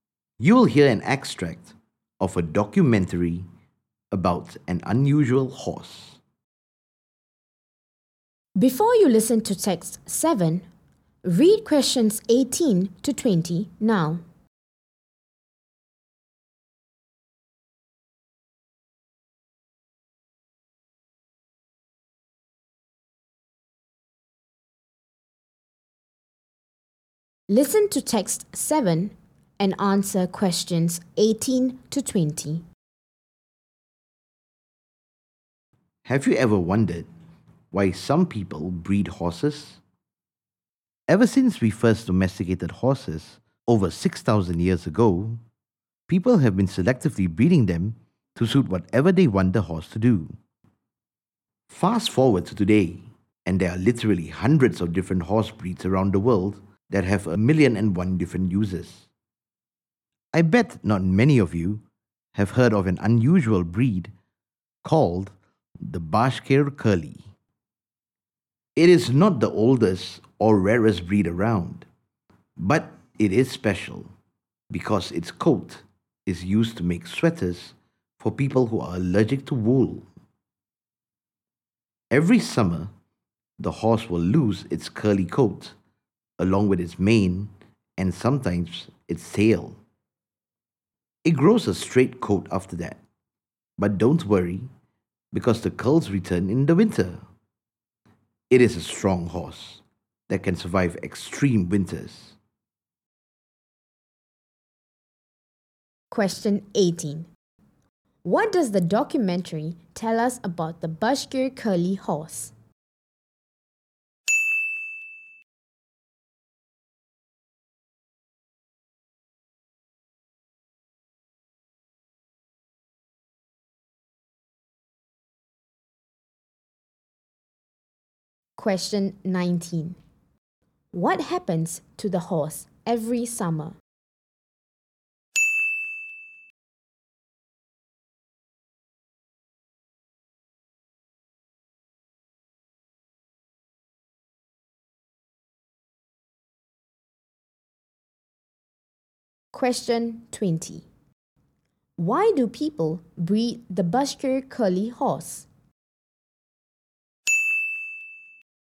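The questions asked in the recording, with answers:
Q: What happens to the horse every summer?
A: It loses its curly coat, along with its mane and sometimes its tail

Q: Why do people breed the Bashkir Curly horse?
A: Its coat is used to make sweaters for people who are allergic to wool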